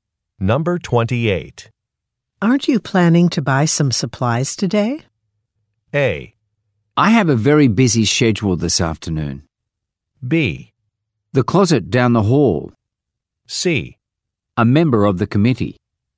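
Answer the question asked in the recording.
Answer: A: I have a very busy schedule this afternoon.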